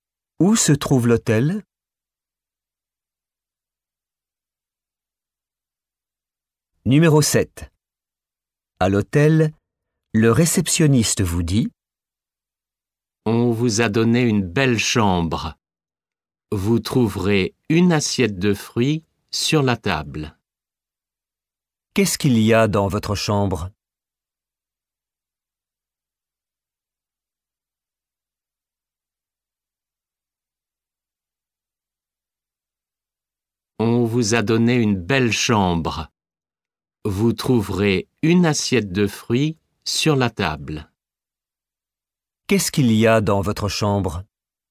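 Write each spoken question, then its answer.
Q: Qu'est-ce qu'il y a dans votre chambre?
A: Une assiette de fruits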